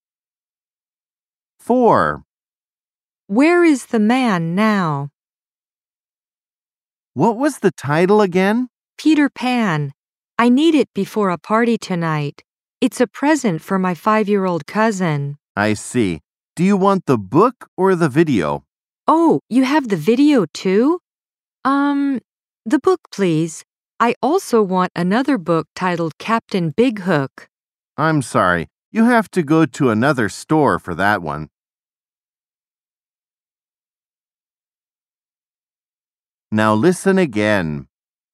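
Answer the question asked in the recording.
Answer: At a bookstore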